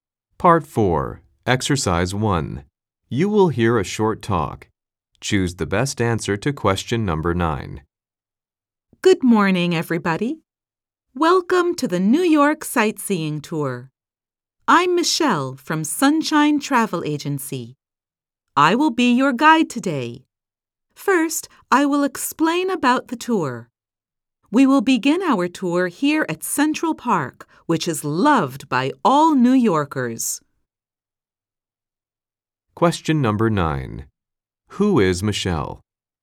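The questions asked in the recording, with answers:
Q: Who is Michelle?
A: A tour guide from Sunshine Travel Agency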